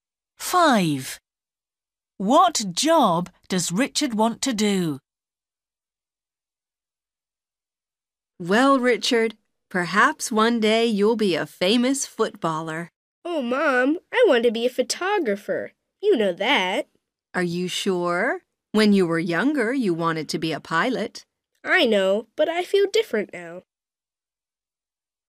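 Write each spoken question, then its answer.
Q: What job does Richard want to do?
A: photographer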